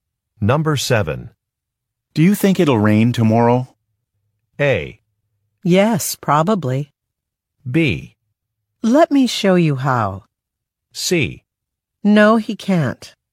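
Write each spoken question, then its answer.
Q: Do you think it'll rain tomorrow?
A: A: Yes, probably.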